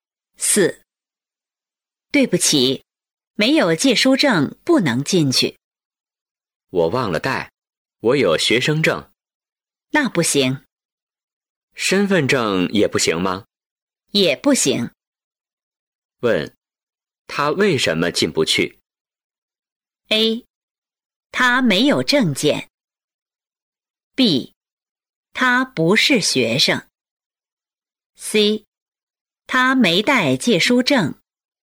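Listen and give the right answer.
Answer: C: 他没带借书证。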